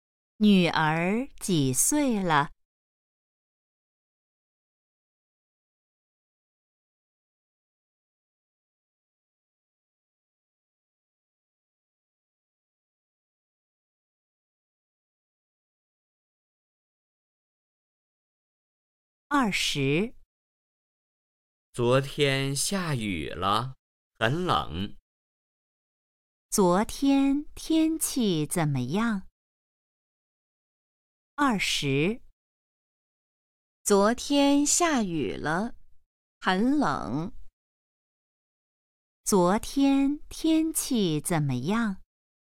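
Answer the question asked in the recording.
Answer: 下雨了,很冷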